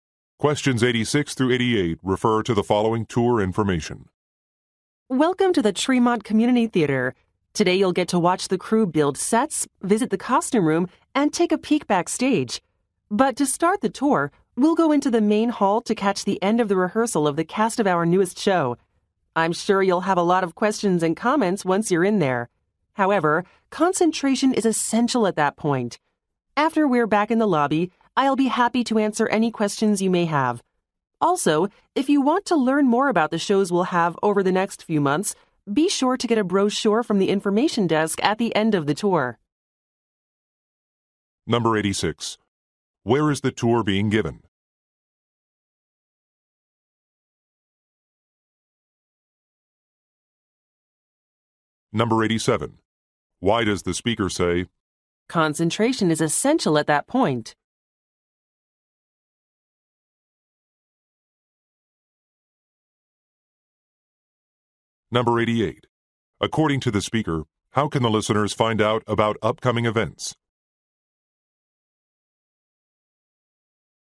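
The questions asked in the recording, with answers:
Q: Where is the tour being given?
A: At a community theater

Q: According to the speaker, how can the listeners find out about upcoming events?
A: By getting a brochure from the information desk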